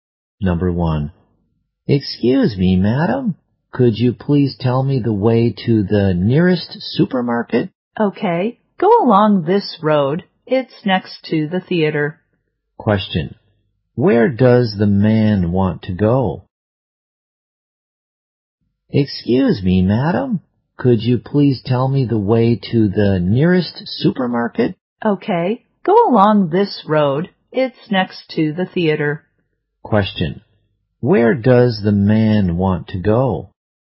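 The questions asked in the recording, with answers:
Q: where does the man want to go?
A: The nearest supermarket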